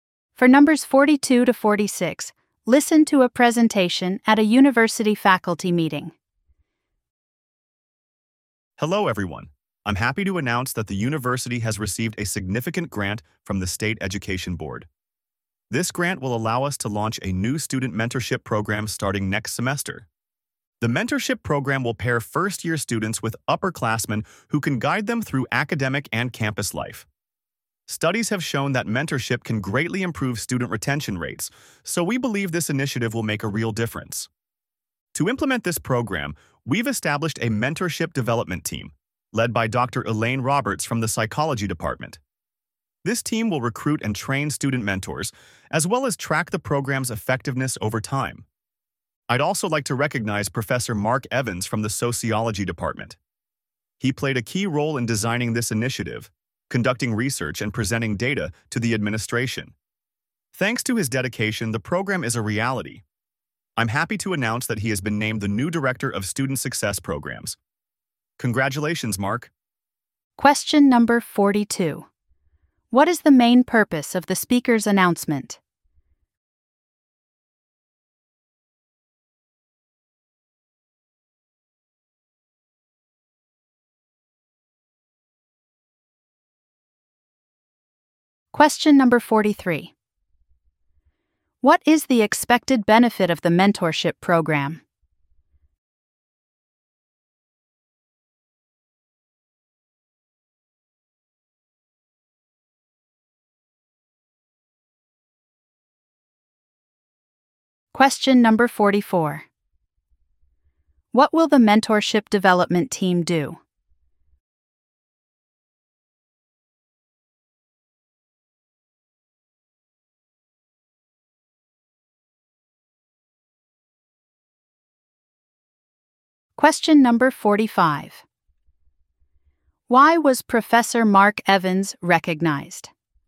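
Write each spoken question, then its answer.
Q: What is the main purpose of the speaker's announcement?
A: To announce a new student mentorship program funded by a grant

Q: What is the expected benefit of the mentorship program?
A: Better student retention

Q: What will the mentorship development team do?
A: Recruit and train mentors and track the program's effectiveness

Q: Why was Professor Mark Evans recognized?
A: He played a key role in designing the initiative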